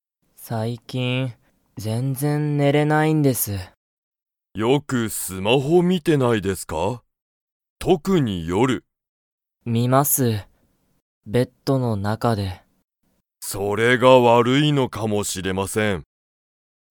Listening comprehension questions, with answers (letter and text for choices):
Comprehension Quiz (Skip if you don't understand the conversation yet)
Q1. 加藤かとうさんは最近さいきん、よく寝ねれますか?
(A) はい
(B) いいえ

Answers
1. (B) いいえ

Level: Level 1